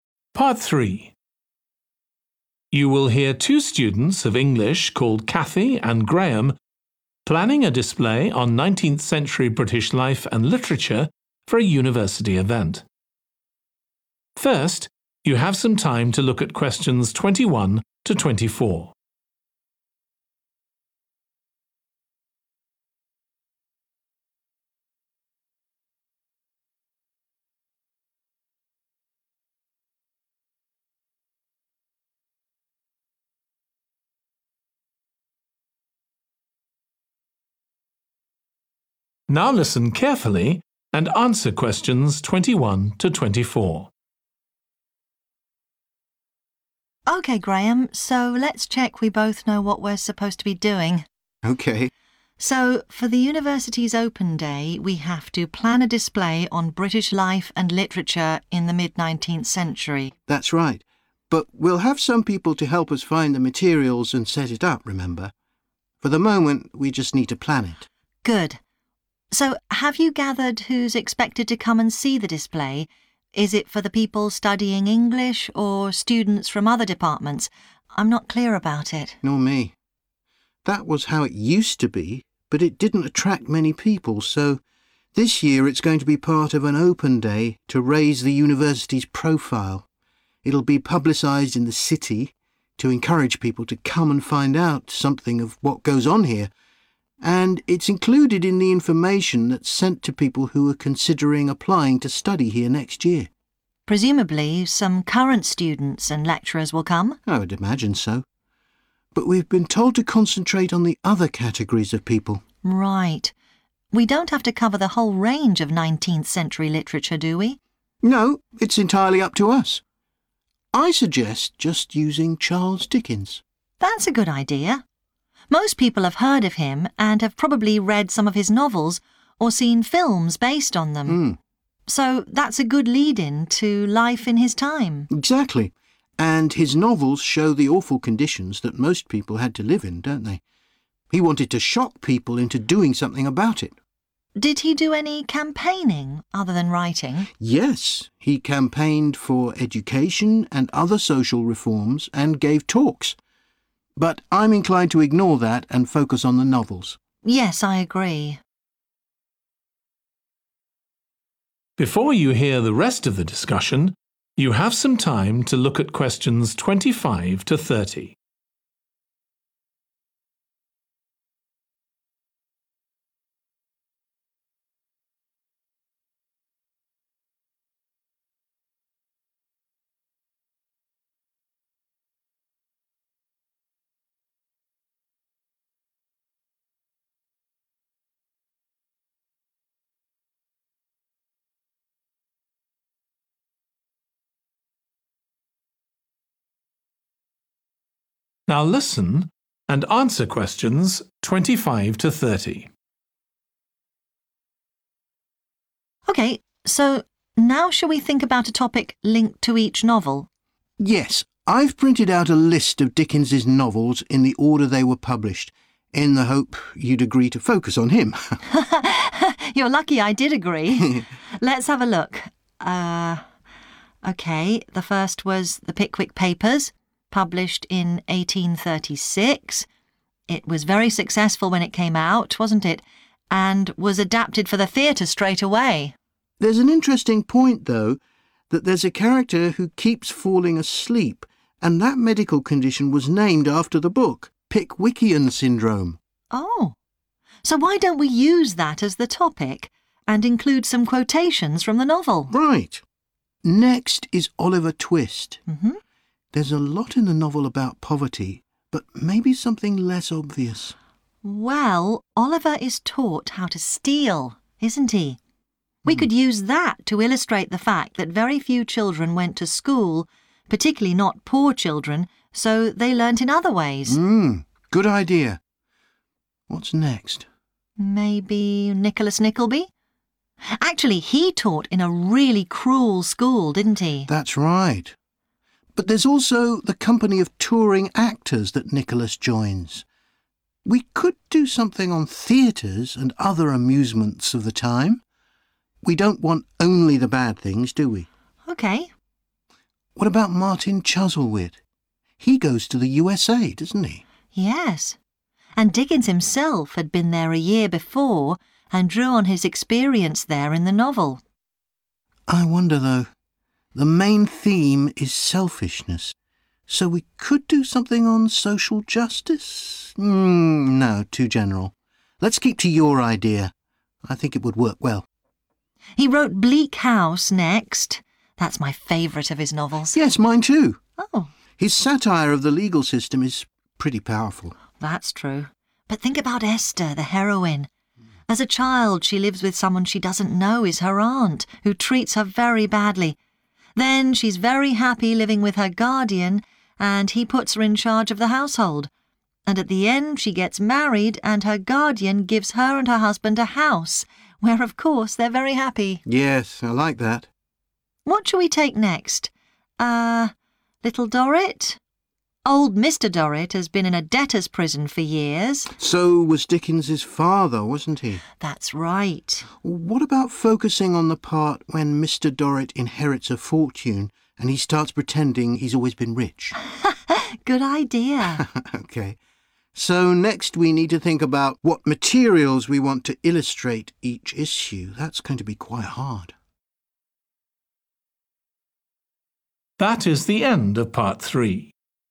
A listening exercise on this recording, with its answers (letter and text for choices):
Choose TWO letters, A-E.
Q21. Which TWO groups of people is the display primarily intended for?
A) student from the English department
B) residents of the local area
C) the university's teaching staff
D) potential new students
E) students from other departments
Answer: B) residents of the local area

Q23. What are Cathy and Graham's TWO reasons for choosing the novelist Charles Dickens?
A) His speeches inspired others to try to improve society.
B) He used his publications to draw attention to social problems.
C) His novels are well-known now.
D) He was consulted on a number of social issues.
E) His reputation has changed in recent times.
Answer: B) He used his publications to draw attention to social problems.

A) poverty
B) education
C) Dickens's travels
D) entertainment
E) crime and the law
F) wealth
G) medicine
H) a woman's life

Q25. The Pickwick Papers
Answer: G) medicine

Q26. Oliver Twist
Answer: B) education

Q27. Nicholas Nickleby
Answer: D) entertainment

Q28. Martin Chuzzlewit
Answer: C) Dickens's travels

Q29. Bleak House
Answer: H) a woman's life

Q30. Little Dorrit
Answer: F) wealth

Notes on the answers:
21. The correct answer is B (residents of the local area) and D (potential new students) because the transcript mentions the promotion of the display in the city to attract people, which would include local residents, and also indicates that the information is sent to those considering applying to study at the university, referring to potential new students.
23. The correct answer is B and C because they align with the excerpt where it is discussed how Dickens used his novels to showcase terrible living conditions to urge people to make changes. This connects to him drawing attention to social problems through his publications and the fact that his novels are still famous today.
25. The correct answer is 'G' (medicine) because the character's medical condition mentioned in the excerpt connects the novel 'The Pickwick Papers' to the topic of medicine.
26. The correct answer is 'B' because the excerpt mentions the lack of schooling for poor children in the novel, highlighting the educational challenges they faced. This aligns with the broader topic of education chosen for representation in Oliver Twist.
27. The correct answer is 'D' because the excerpt mentions Nicholas being part of the company of touring actors and contemplating a focus on theatres and amusements, indicating a theme related to entertainment.
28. The correct answer is 'C' because the excerpt confirms that Dickens incorporated his firsthand experience of traveling into the novel, aligning with the topic of Dickens's travels.
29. The correct answer is 'H - a woman's life' because the excerpt discusses Esther's life journey, including her challenging childhood, fulfilling role in managing a household, and eventual happy marriage and home ownership. These aspects highlight the theme of 'a woman's life' in the novel, making it the suitable choice from the given topics.
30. The correct answer is 'F' because the novel 'Little Dorrit' focuses on themes related to wealth, as seen in the excerpt where Mr. Dorrit's newfound fortune leads him to pretend to be rich.

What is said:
CATHY: OK, Graham, so let's check we both know what we're supposed to be doing.
GRAHAM: OK.
CATHY: So, for the university's open day, we have to plan a display on British life and literature in the mid-19th century.
GRAHAM: That's right. But we'll have some people to help us find the materials and set it up, remember – for the moment, we just need to plan it.
CATHY: Good. So have you gathered who's expected to come and see the display? Is it for the people studying English, or students from other departments? I'm not clear about it.
GRAHAM: Nor me. That was how it used to be, but it didn't attract many people, so this year it's going to be part of an open day, to raise the university's profile. It'll be publicised in the city, to encourage people to come and find out something of what does on here. And it's included in the information that's sent to people who are considering applying to study here next year.
CATHY: Presumably some current students and lecturers will come?
GRAHAM: I would imagine so, but we've been told to concentrate on the other categories of people.
CATHY: Right. We don't have to cover the whole range of 19th-century literature, do we?
GRAHAM: No, it's entirely up to us. I suggest just using Charles Dickens.
CATHY: That's a good idea. Most people have heard of him, and have probably read some of his novels, or seen films based on them, so that's a good lead-in to life in his time.
GRAHAM: Exactly. And his novels show the awful conditions that most people had to live in, don't they: he wanted to shock people into doing something about it.
CATHY: Did he do any campaigning, other than writing?
GRAHAM: Yes, he campaigned for education and other social reforms, and gave talks, but I'm inclined to ignore that and focus on the novels.
CATHY: Yes, I agree.
CATHY: OK, so now shall we think about a topic linked to each novel?
GRAHAM: Yes. I've printed out a list of Dicken's novels in the order they were published, in the hope you'd agree to focus on him!
CATHY: You're lucky I did agree! Let's have a look. OK, the first was The Pickwick Papers, published in 1836. It was very successful when it came out, wasn't it, and was adapted for the theatre straight away.
GRAHAM: There's an interesting point, though, that there's a character who keeps falling asleep, and that medical condition was named after the book – Pickwickian Syndrome.
CATHY: Oh, so why don't we use that as the topic, and include some quotations from the novel?
GRAHAM: Right, Next is Oliver Twist. There's a lot in the novel about poverty. But maybe something less obvious ...
CATHY: Well Oliver is taught how to steal, isn't he? We could use that to illustrate the fact that very few children went to school, particularly not poor children, so they learnt in other ways.
GRAHAM: Good idea. What's next?
CATHY: Maybe Nicholas Nickleby. Actually he taught in a really cruel school, didn't he?
GRAHAM: That's right. But there's also the company of touring actors that Nicholas joins. We could do something on theatres and other amusements of the time. We don't want only the bad things, do we?
CATHY: OK.
GRAHAM: What about Martin Chuzzlewit? He goes to the USA, doesn't he?
CATHY: Yes, and Dickens himself had been there a year before, and drew on his experience there in the novel.
GRAHAM: I wonder, though ... The main theme is selfishness, so we could do something on social justice? No, too general, let's keep to your idea – I think it would work well.
CATHY: He wrote Bleak House next – that's my favourite of his novels.
GRAHAM: Yes, mine too. His satire of the legal system is pretty powerful.
CATHY: That's true, but think about Esther, the heroine. As a child she lives with someone she doesn't know is her aunt, who treats her very badly. Then she's very happy living with her guardian, and he puts her in charge of the household. And at the end she gets married and her guardian gives her and her husband a house, where of course they're very happy.
GRAHAM: Yes, I like that.
CATHY: What shall we take next? Old Mr Dorrit has been in a debtors' prison for years ...
GRAHAM: So was Dicken's father, wasn't he?
CATHY: That's right.
GRAHAM: What about focusing on the part when Mr Dorrit inherits a fortune, and he starts pretending he's always been rich?
CATHY: Good idea.
GRAHAM: OK, so next we need to think about what materials we want to illustrate each issue. That's going to be quite hard.